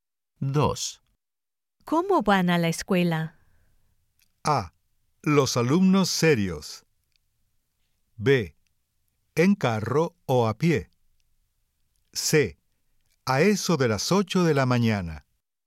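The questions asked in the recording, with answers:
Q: ¿Cómo van a la escuela?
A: B: En carro o a pie.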